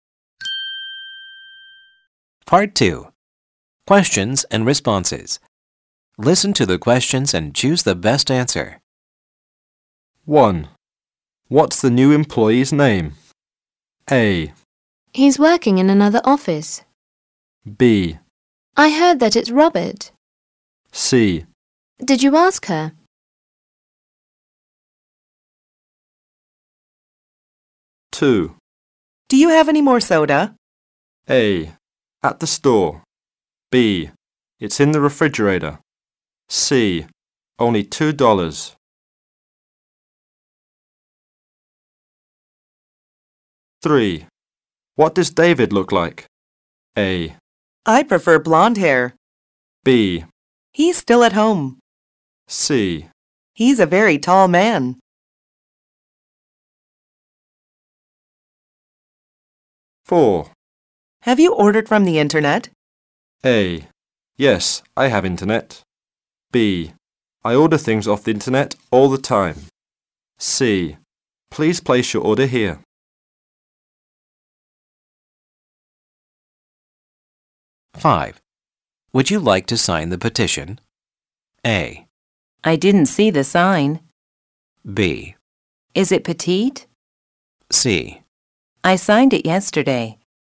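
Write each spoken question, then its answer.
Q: What's the new employee's name?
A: B: I heard that it's Robert.

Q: Do you have any more soda?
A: B: It's in the refrigerator.

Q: What does David look like?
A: C: He's a very tall man.

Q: Have you ordered from the internet?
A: B: I order things off the internet all the time.

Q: Would you like to sign the petition?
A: C: I signed it yesterday.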